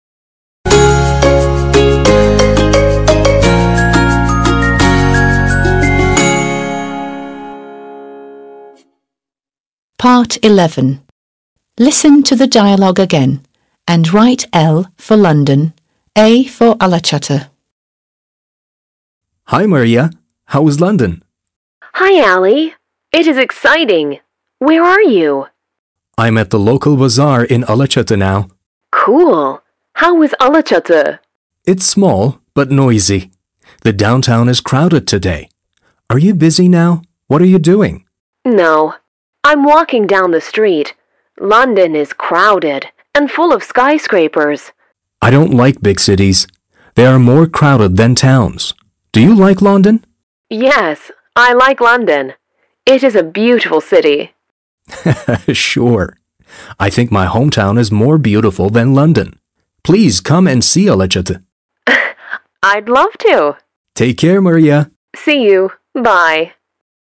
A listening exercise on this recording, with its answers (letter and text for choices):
11. Listen to the dialogue again and write L for London, A for Alaçatı.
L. London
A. Alaçatı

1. It's full of skyscrapers.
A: L. London

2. It's Ali's hometown.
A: A. Alaçatı

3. It is more crowded.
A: L. London

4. It's crowded today because there is a local bazaar.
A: A. Alaçatı

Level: 6. Sınıf